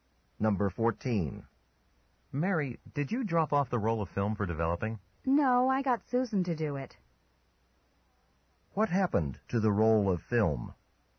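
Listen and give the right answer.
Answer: Susan dropped it off for developing.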